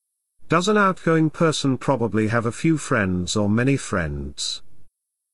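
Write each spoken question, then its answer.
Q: Does an outgoing person probably have a few friends or many friends?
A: many friends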